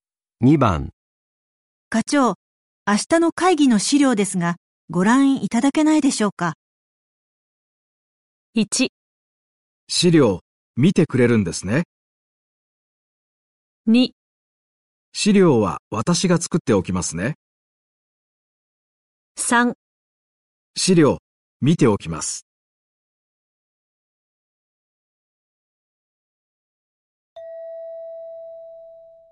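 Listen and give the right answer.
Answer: 3: 資料、見ておきます。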